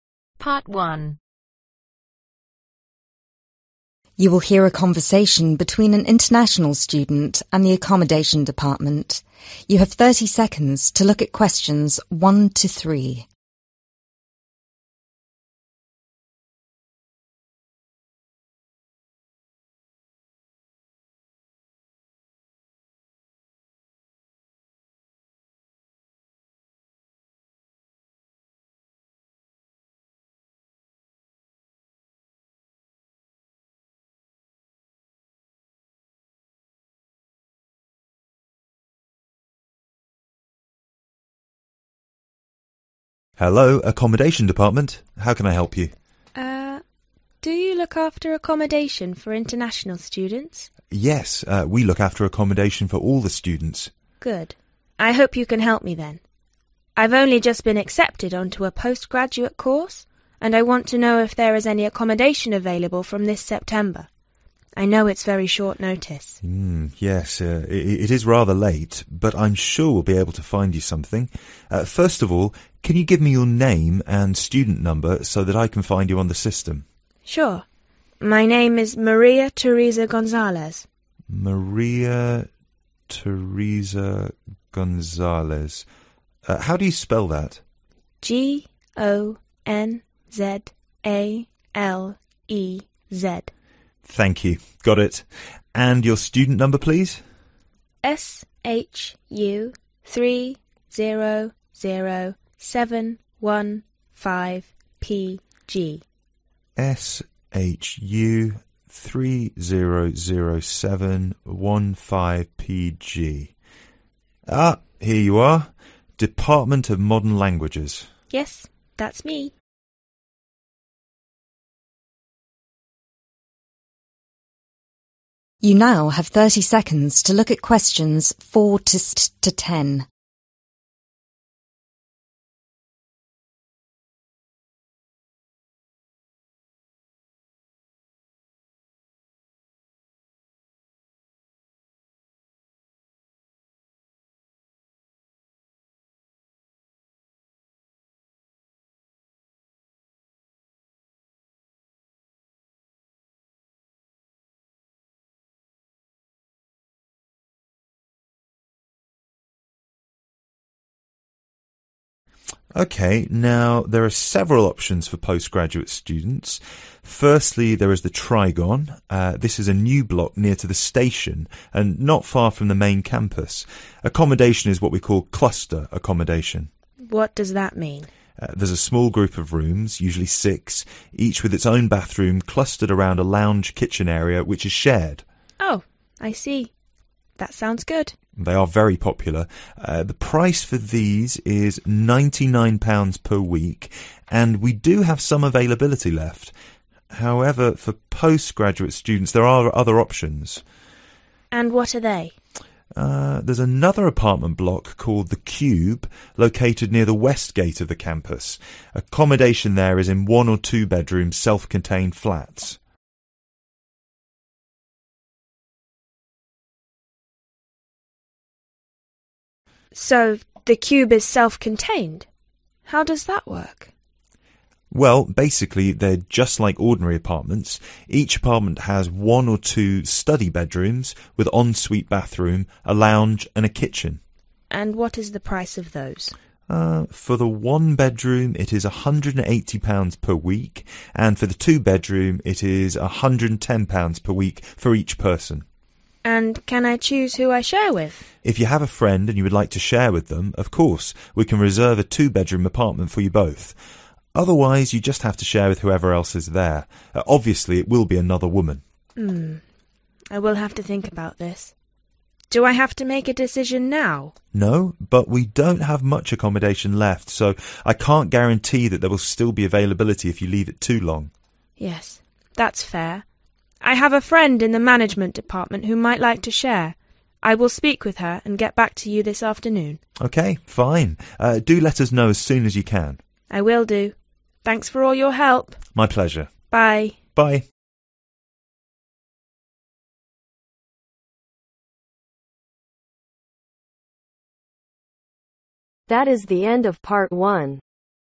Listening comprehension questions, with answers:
Complete the form below. Write ONE WORD OR A NUMBER for each answer.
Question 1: Student Name: Maria Teresa (1)............ Vila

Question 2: Student Number: (2)............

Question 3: Faculty: Modern (3)............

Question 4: Located near (4)............ and main campus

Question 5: (5)£............ per week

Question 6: Located near (6)............ entrance to campus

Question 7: (7)............ room options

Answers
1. GONZALEZ
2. SHU300715PG
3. languages
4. station
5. £99
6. west
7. 2